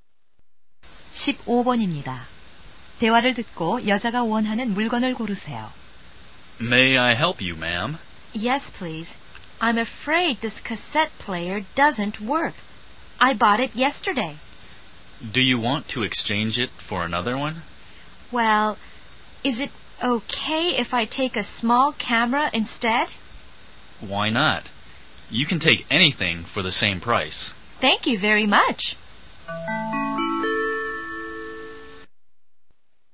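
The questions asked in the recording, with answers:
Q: 대화를 듣고 여자가 원하는 물건을 고르세요.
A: 작은 카메라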